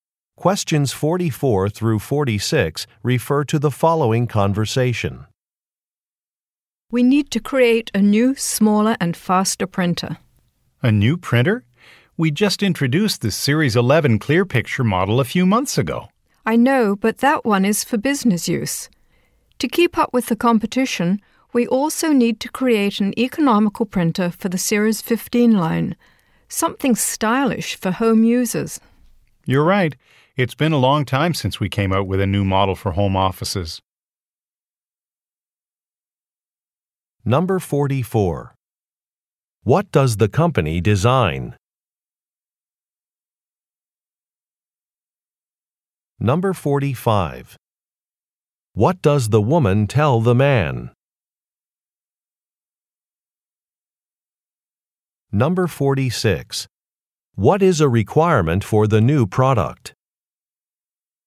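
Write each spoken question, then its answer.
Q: What does the company design?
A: Printers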